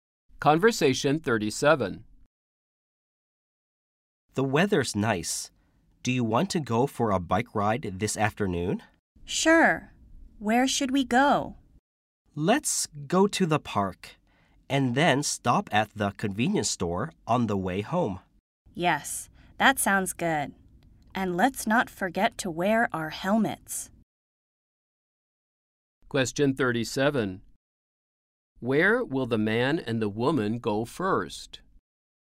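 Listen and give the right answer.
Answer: To the park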